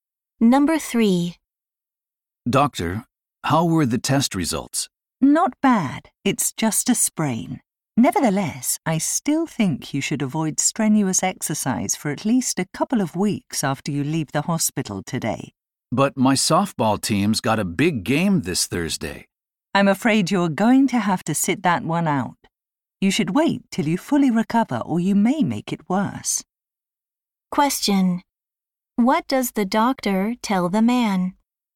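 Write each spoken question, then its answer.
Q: What does the doctor tell the man?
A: He should not play in the softball game and should avoid strenuous exercise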